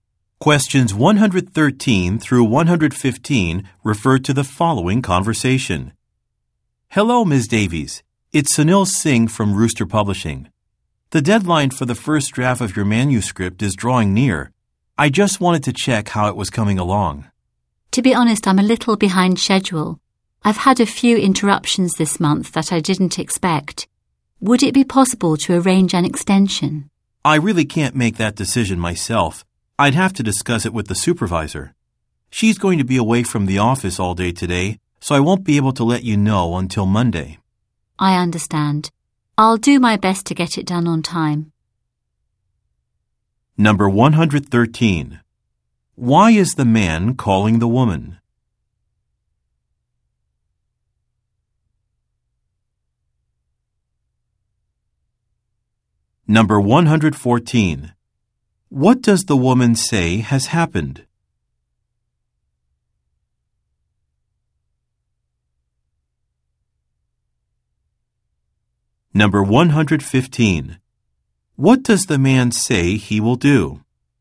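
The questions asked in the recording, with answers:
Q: Why is the man calling the woman?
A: To ask how her manuscript is coming along before the deadline

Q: What does the woman say has happened?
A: She had some unexpected interruptions and is behind schedule

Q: What does the man say he will do?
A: Talk to his supervisor about an extension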